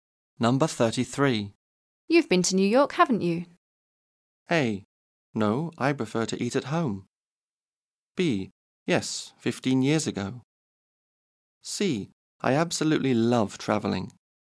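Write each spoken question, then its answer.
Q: You've been to New York, haven't you?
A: B: Yes, 15 years ago.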